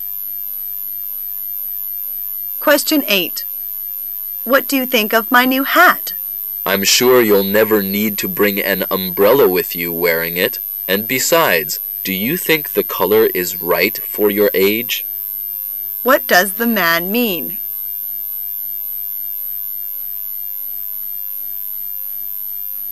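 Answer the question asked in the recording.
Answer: He doesn't like the hat: it's too big and the color doesn't suit her age.

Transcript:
[解析] W: What do you think of my new hat? M: I'm sure you'll never need to bring an umbrella with you wearing it. And besides, do you think the color is right for your age?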